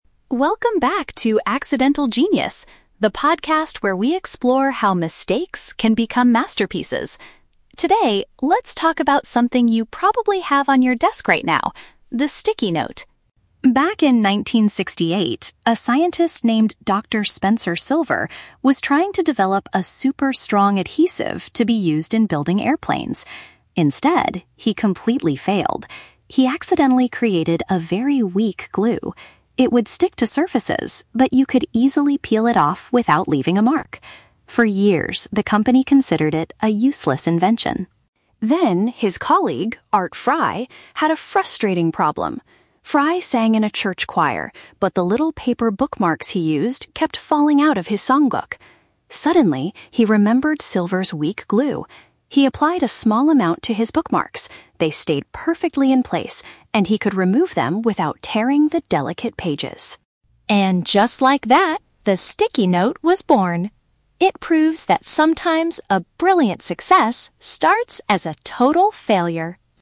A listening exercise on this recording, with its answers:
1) What was Dr. Spencer Silver originally trying to create?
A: A powerful substance to hold aircraft parts together.

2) What issue did Art Fry face at his church?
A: He repeatedly lost his place in his music book.

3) What is the main message of this podcast episode?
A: An unsuccessful experiment can sometimes lead to a great product.

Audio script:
Host: Welcome back to Accidental Genius, the podcast where we explore how mistakes can become masterpieces. Today, let's talk about something you probably have on your desk right now: the sticky note.
Back in 1968, a scientist named Dr. Spencer Silver was trying to develop a super-strong adhesive to be used in building airplanes. Instead, he completely failed. He accidentally created a very weak glue. It would stick to surfaces, but you could easily peel it off without leaving a mark. For years, the company considered it a useless invention.
Then, his colleague, Art Fry, had a frustrating problem. Fry sang in a church choir, but the little paper bookmarks he used kept falling out of his songbook. Suddenly, he remembered Silver's weak glue. He applied a small amount to his bookmarks. They stayed perfectly in place, and he could remove them without tearing the delicate pages!
And just like that, the sticky note was born. It proves that sometimes, a brilliant success starts as a total failure!